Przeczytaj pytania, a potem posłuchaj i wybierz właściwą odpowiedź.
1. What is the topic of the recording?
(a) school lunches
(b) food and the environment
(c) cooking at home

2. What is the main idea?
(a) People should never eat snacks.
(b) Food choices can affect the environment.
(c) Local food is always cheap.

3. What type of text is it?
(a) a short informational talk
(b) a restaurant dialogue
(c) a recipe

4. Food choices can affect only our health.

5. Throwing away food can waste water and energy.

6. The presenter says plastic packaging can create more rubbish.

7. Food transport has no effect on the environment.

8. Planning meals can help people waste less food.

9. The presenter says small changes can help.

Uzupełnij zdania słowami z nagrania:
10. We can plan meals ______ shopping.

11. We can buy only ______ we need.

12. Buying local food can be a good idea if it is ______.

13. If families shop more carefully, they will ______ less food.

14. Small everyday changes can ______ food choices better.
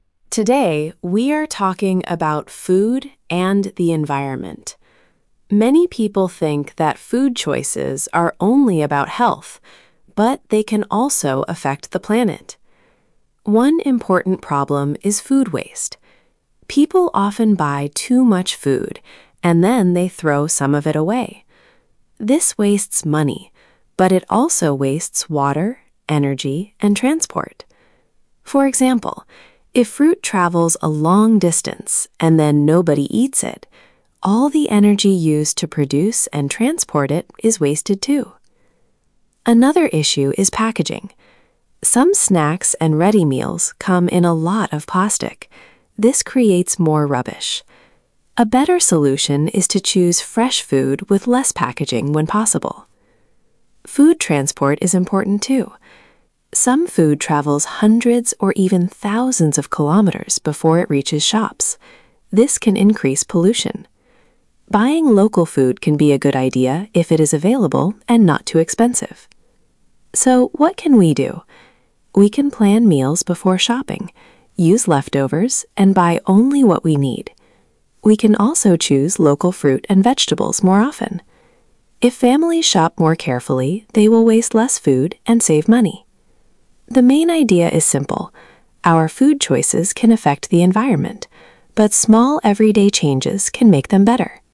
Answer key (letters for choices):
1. b
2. b
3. a
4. False
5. True
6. True
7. False
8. True
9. True
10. before
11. what
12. available
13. waste
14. make

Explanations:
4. food choices can also affect the environment.
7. the presenter says it can increase pollution.

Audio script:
Presenter: Today we are talking about food and the environment. Many people think that food choices are only about health, but they can also affect the planet.
One important problem is food waste. People often buy too much food, and then they throw some of it away. This wastes money, but it also wastes water, energy and transport. For example, if fruit travels a long distance and then nobody eats it, all the energy used to produce and transport it is wasted too.
Another issue is packaging. Some snacks and ready meals come in a lot of plastic. This creates more rubbish. A better solution is to choose fresh food with less packaging when possible.
Food transport is important too. Some food travels hundreds or even thousands of kilometres before it reaches shops. This can increase pollution. Buying local food can be a good idea if it is available and not too expensive.
So, what can we do? We can plan meals before shopping, use leftovers and buy only what we need. We can also choose local fruit and vegetables more often. If families shop more carefully, they will waste less food and save money.
The main idea is simple: our food choices can affect the environment, but small everyday changes can make them better.

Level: A2+/B1